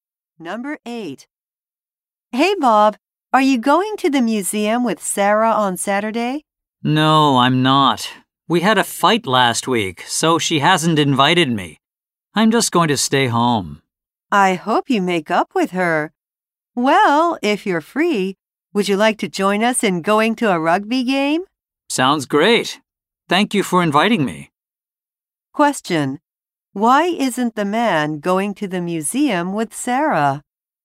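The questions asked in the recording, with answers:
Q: Why isn't the man going to the museum with Sarah?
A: They had a fight, so she didn't invite him.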